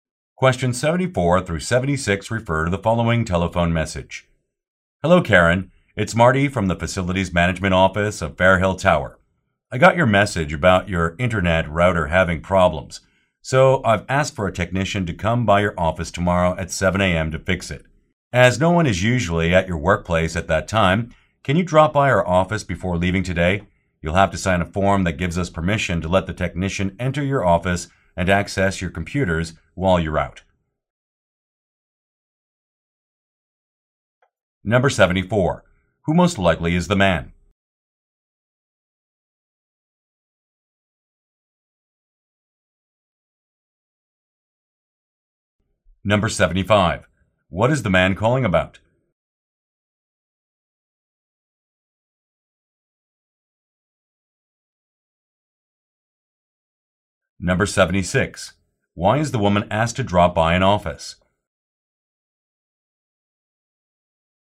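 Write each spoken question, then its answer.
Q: Who most likely is the man?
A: A facilities management worker

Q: What is the man calling about?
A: Repair of her internet router

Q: Why is the woman asked to drop by an office?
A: To sign a permission form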